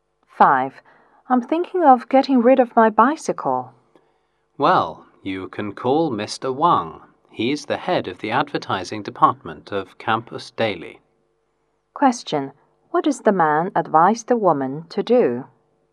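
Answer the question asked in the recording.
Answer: Advertise her bicycle in Campus Daily by calling Mr. Wang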